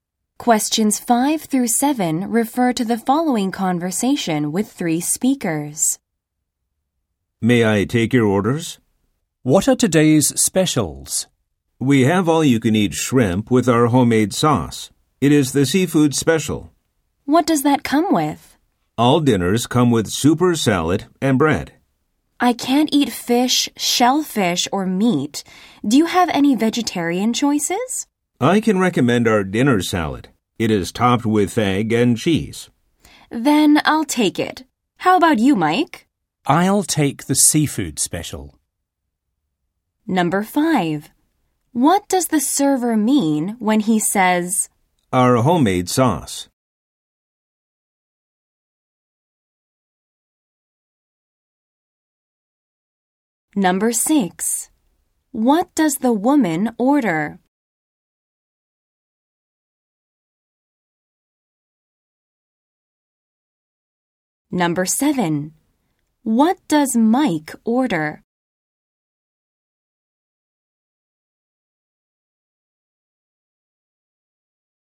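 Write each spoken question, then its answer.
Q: What does the woman order?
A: The dinner salad

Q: What does Mike order?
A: The seafood special (all-you-can-eat shrimp)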